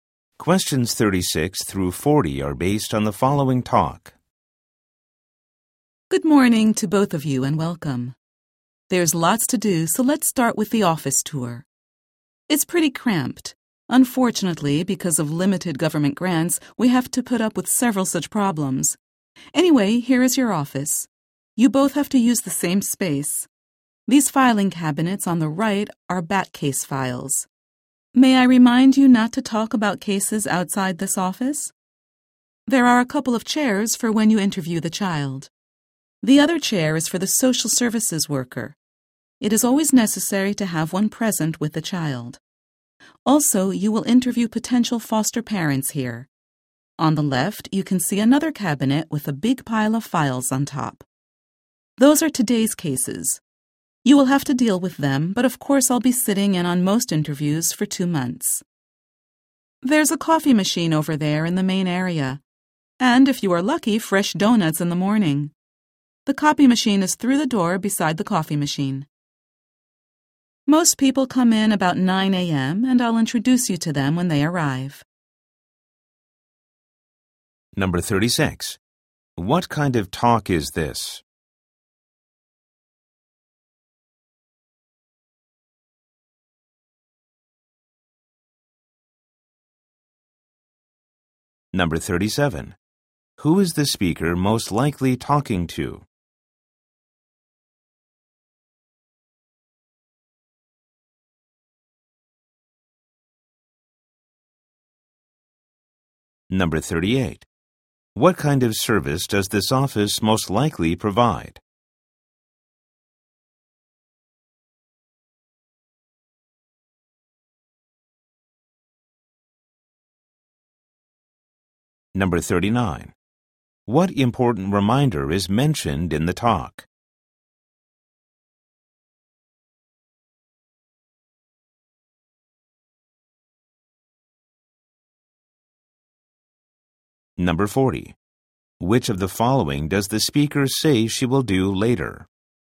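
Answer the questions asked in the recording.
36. An office orientation tour for new staff
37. Two new employees
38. Child welfare/foster care services
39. Don't talk about cases outside the office
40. Introduce them to staff when they arrive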